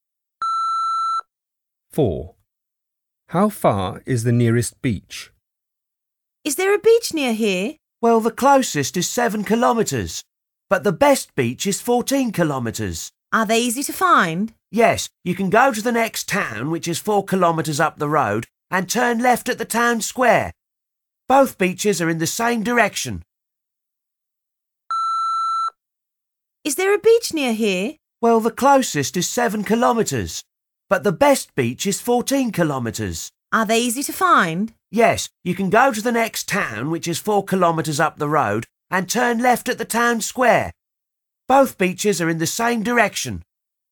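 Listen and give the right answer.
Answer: 7 kilometres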